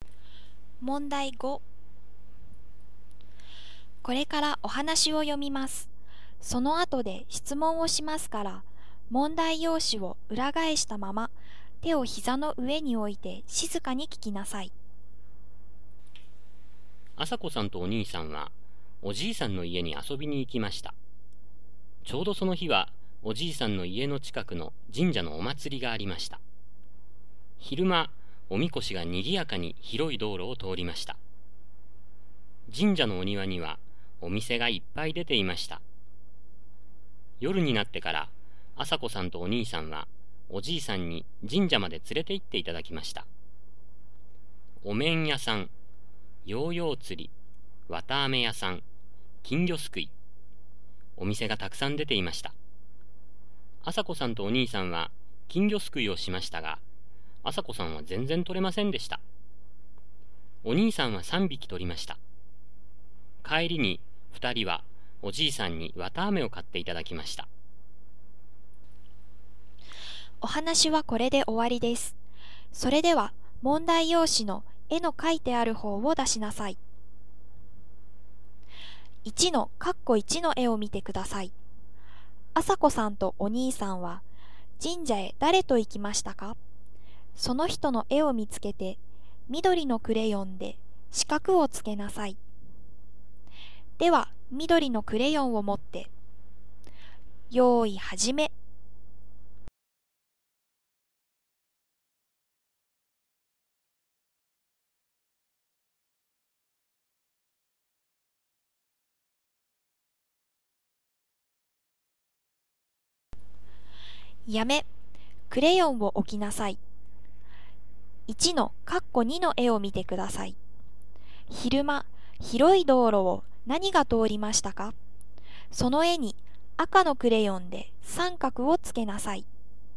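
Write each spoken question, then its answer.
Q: 朝子さんとお兄さんは神社へ誰と行きましたか?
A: おじいさん

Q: 昼間、広い道路を何が通りましたか?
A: おみこし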